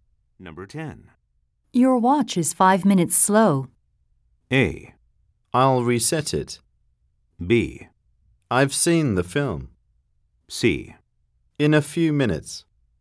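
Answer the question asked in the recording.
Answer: A: I'll reset it.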